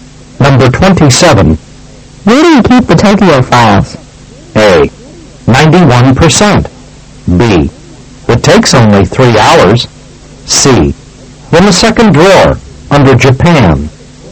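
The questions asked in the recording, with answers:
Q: Where do you keep the Tokyo files?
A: C: In the second drawer, under Japan.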